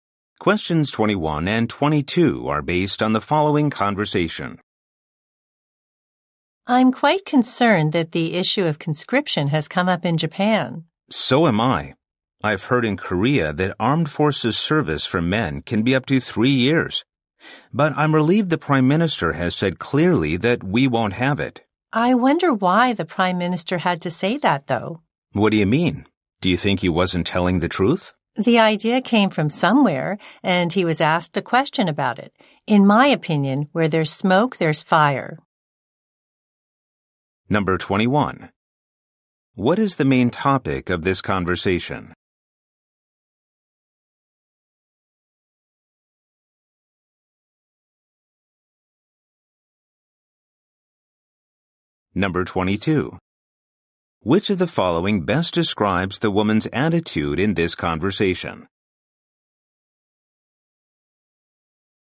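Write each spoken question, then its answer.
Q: What is the main topic of this conversation?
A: Conscription in Japan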